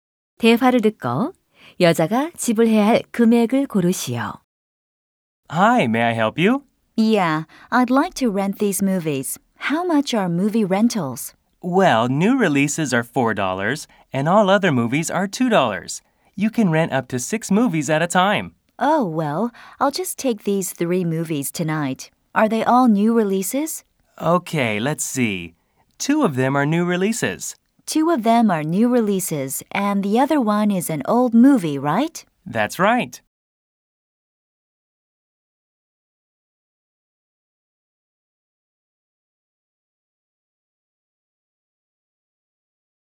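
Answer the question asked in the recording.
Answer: 10달러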